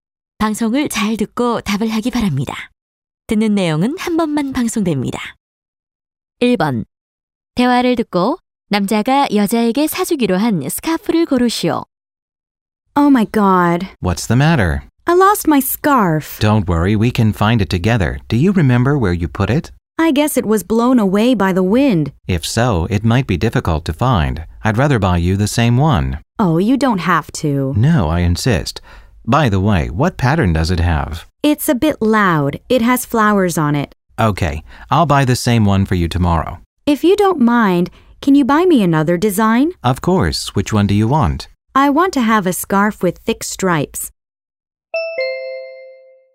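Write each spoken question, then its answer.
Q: 대화를 듣고 남자가 여자에게 사주기로 한 스카프를 고르시오.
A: 굵은 줄무늬 스카프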